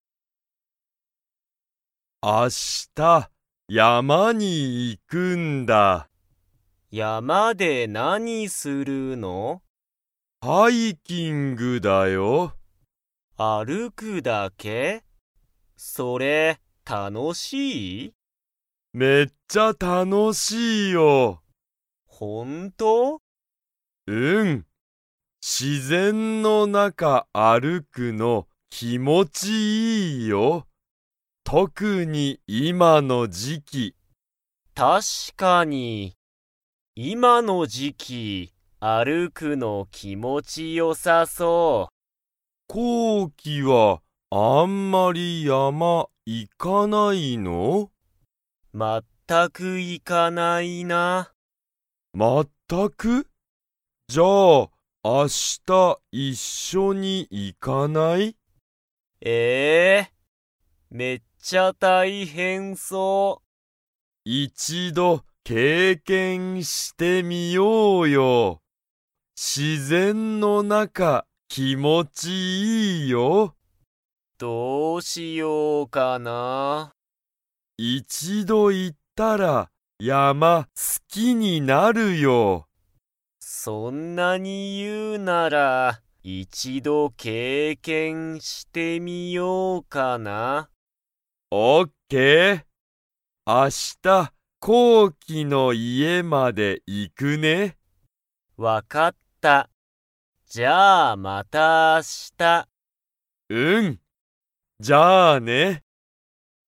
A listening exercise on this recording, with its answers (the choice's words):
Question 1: つよしは、自然(しぜん)の中(なか)歩(ある)くのが____。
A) 気持きもちいい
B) 初(はじ)めてだ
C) 大変(たいへん)そうだ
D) 好(す)きじゃない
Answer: 気持きもちいい

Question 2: こうきとつよしは、明日一緒(あしたいっしょ)に山(やま)に行(い)きますか?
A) はい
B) いいえ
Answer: はい

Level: Level 2